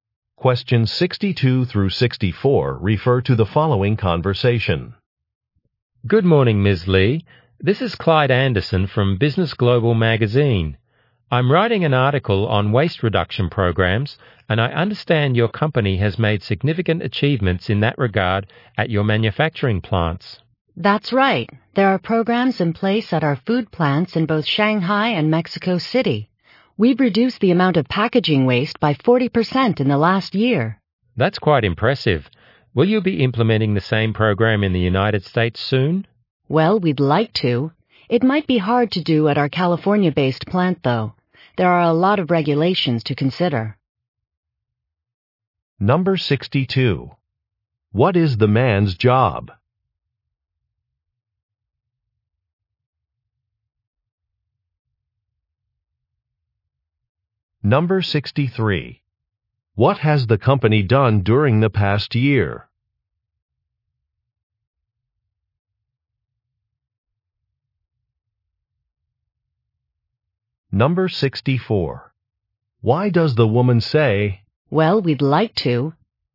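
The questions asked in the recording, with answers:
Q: What is the man's job?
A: Magazine writer

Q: What has the company done during the past year?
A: Reduced packaging waste by 40%

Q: Why does the woman say,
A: To indicate that implementing the program in the US may be difficult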